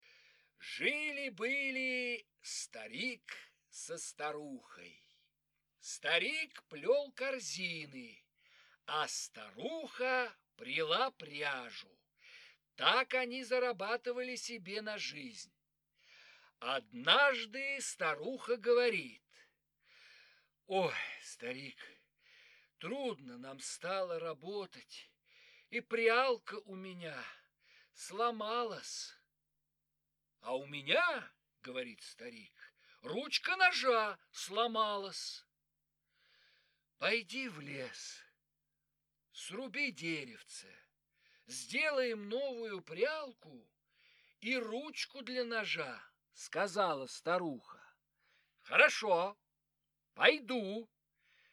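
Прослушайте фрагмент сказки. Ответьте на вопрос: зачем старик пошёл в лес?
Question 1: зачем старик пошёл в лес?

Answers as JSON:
{"1": "Чтобы срубить деревце и сделать новую прялку и ручку для ножа."}

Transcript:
Жили-были старик со старухой. Старик плёл корзины, а старуха пряла пряжу. Так они зарабатывали себе на жизнь.
Однажды старуха говорит:
– Ой, старик, трудно нам стало работать, и прялка у меня сломалась!
– А у меня,– говорит старик, – ручка ножа сломалась.
– Пойди в лес, сруби деревце. Сделаем новую прялку и ручку для ножа, – сказала старуха.
– Хорошо, пойду!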